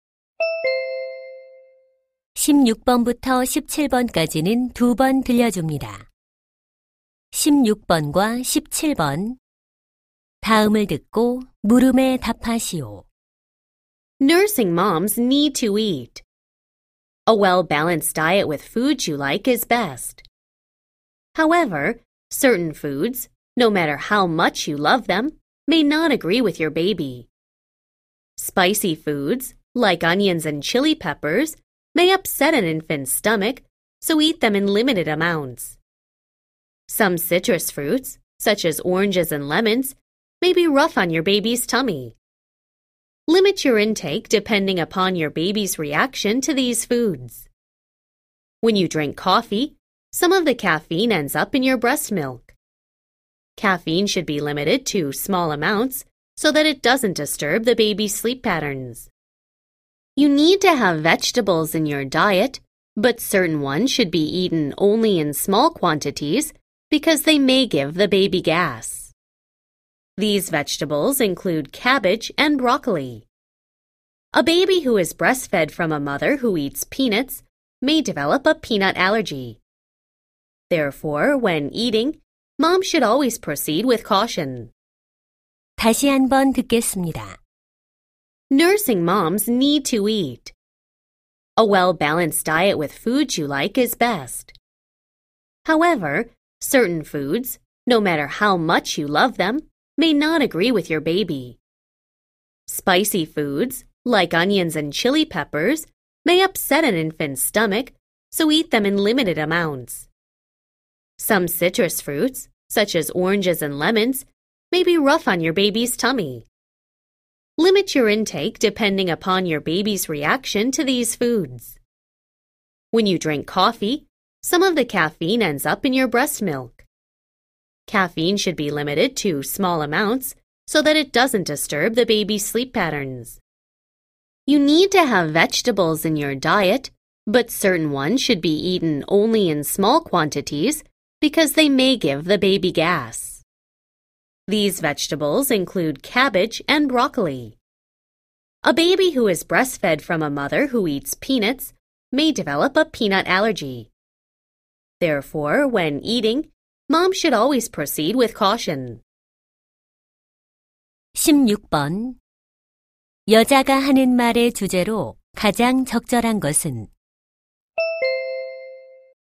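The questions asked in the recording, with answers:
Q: 여자가 하는 말의 주제로 가장 적절한 것은?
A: 수유 중인 엄마가 섭취를 줄여야 할 음식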